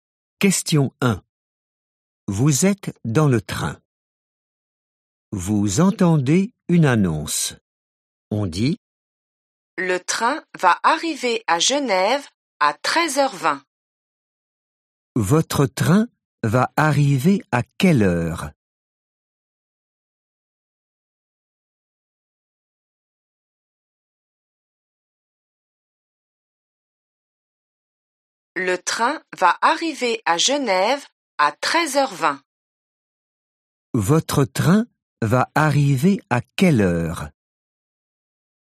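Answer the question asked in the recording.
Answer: 13h20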